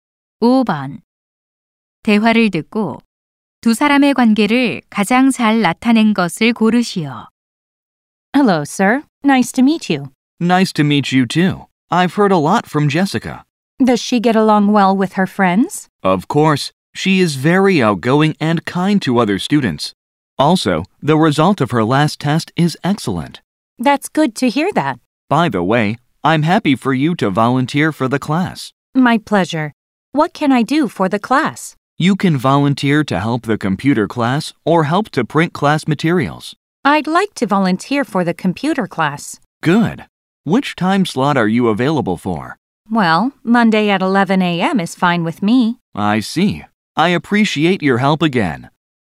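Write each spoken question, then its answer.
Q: 대화를 듣고 두 사람의 관계를 가장 잘 나타낸 것을 고르시오.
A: 교사 - 학부모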